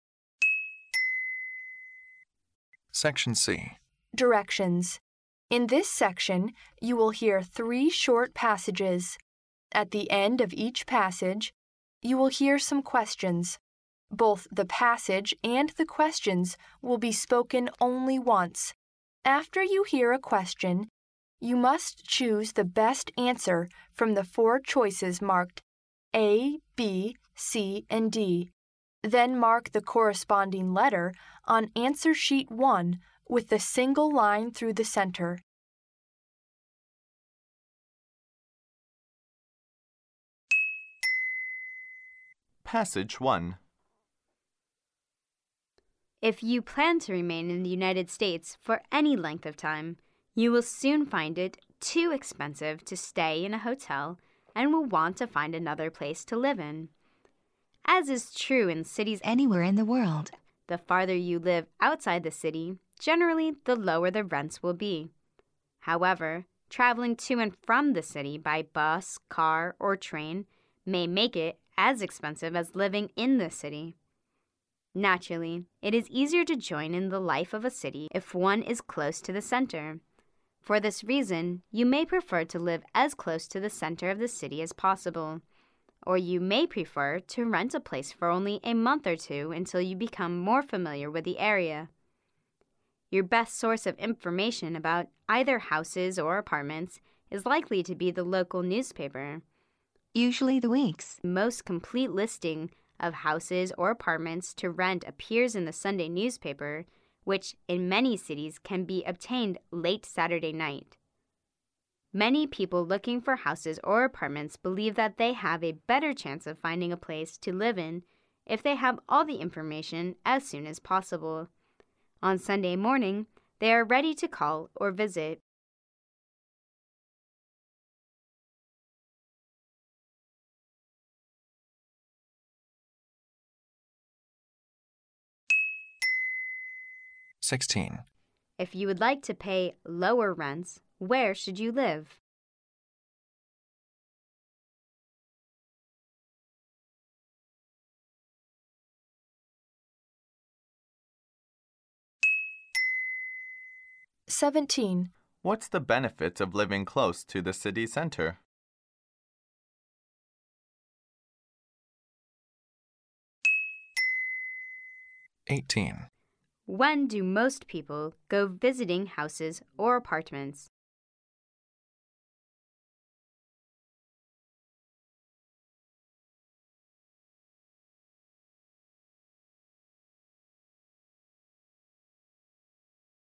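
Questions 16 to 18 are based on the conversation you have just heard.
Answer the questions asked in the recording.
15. Farther outside the city
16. It is easier to join in the life of the city
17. On Sunday morning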